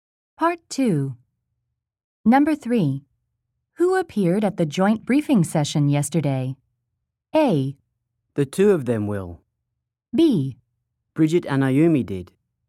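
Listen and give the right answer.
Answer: B: Bridget and Ayumi did.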